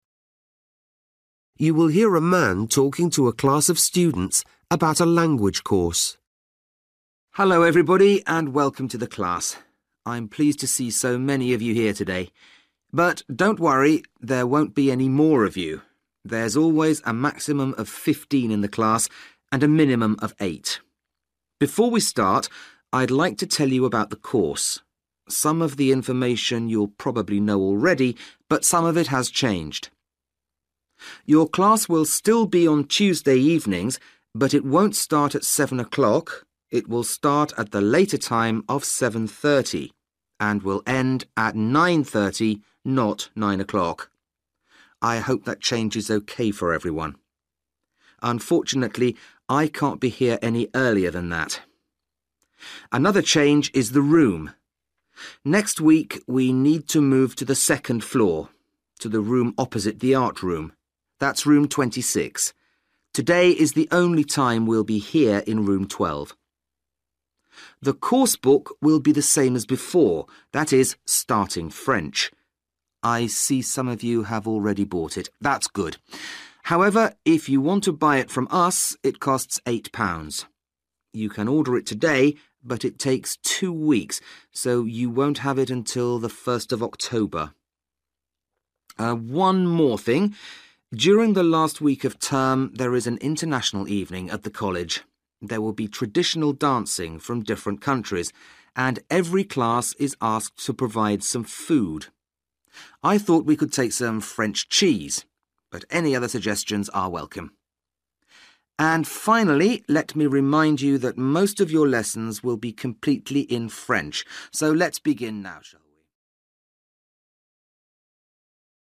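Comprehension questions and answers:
For each question, write the correct answer in the gap. Write one or two words or a number or a date or a time. You will hear a man talking to a class of students about a language course.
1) Maximum (1) students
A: 15

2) Day and time: Tuesday, 7.30 p.m. - (2) p.m.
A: 9.30

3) Place: Room 26, second floor (opposite the (3) )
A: art room

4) Coursebook title: (4) French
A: Starting

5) Price: £8 (if you order now, it will arrive on 1st (5) )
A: October

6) International evening: Each class will provide some (6)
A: food

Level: Luyện nghe trình độ B1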